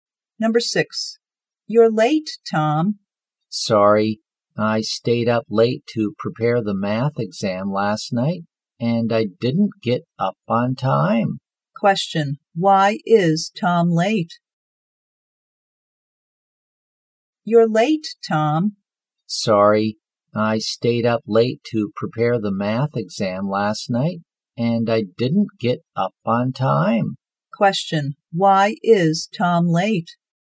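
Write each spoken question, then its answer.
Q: why is Tom late?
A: He stayed up late preparing for the math exam and didn't get up on time.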